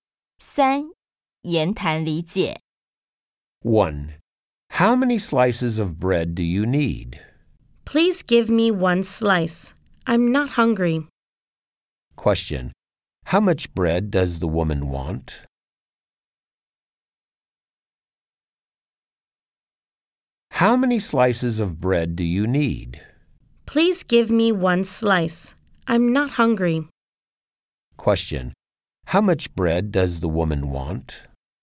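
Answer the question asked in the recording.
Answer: One slice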